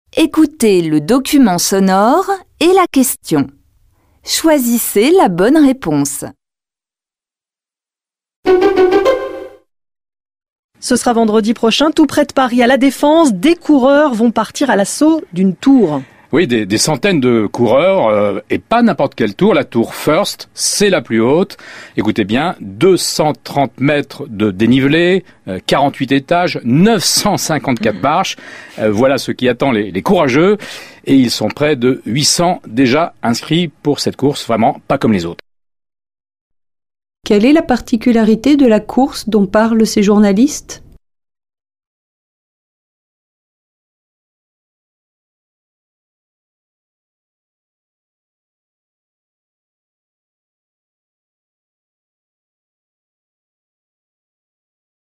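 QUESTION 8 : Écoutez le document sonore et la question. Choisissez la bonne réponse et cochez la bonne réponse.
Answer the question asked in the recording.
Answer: Les coureurs montent les marches de la plus haute tour de La Défense.

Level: Tăng dần từ trình độ A1 đến C1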